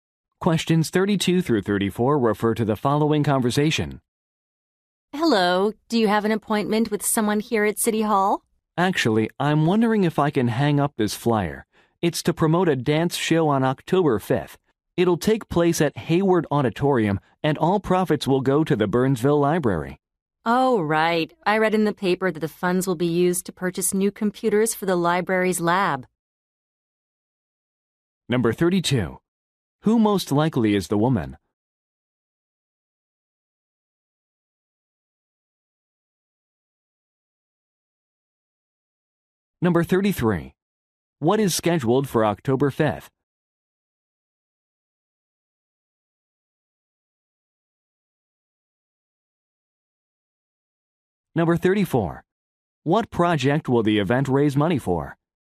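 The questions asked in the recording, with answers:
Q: What is scheduled for October 5th?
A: A dance show

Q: What project will the event raise money for?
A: Buying new computers for the library's lab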